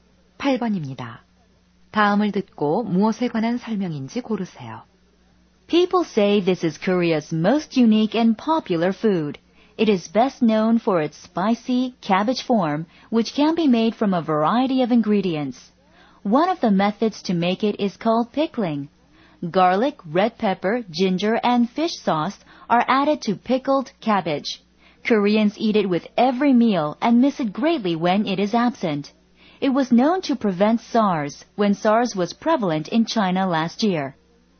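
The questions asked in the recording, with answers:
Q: 다음을 듣고 무엇에 관한 설명인지 고르세요.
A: 김치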